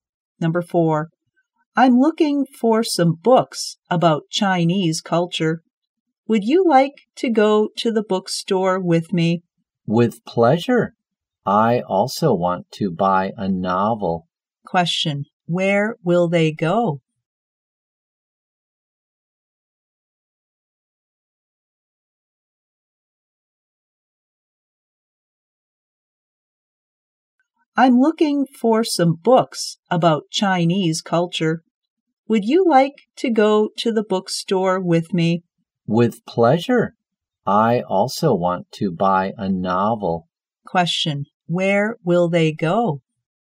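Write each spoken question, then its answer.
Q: where will they go?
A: To the bookstore.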